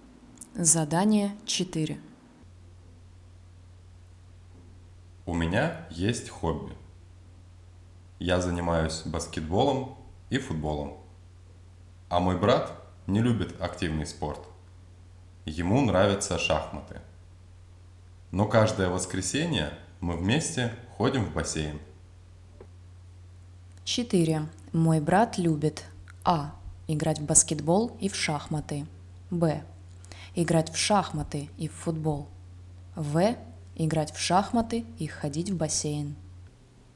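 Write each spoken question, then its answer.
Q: Мой брат любит А. играть в баскетбол и в шахматы. Б. играть в шахматы и в футбол. В. играть в шахматы и ходить в бассейн.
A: В: играть в шахматы и ходить в бассейн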